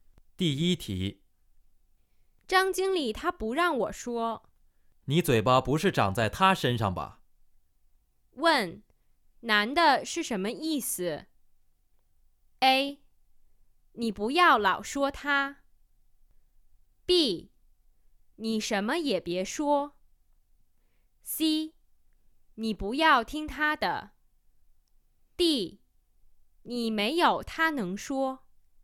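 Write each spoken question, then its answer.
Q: 问,男的是什么意思?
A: C: 你不要听他的。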